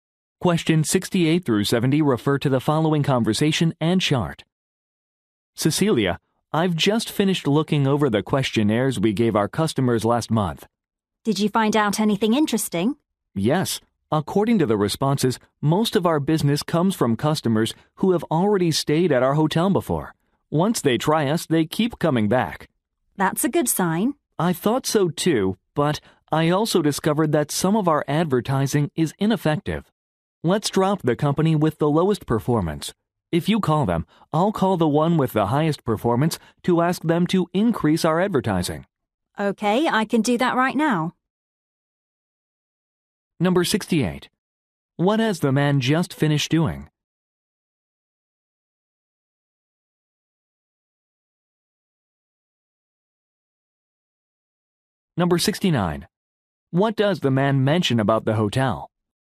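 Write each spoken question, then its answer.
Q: What has the man just finished doing?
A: Looking over customer questionnaires

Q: What does the man mention about the hotel?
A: Most of its business comes from returning customers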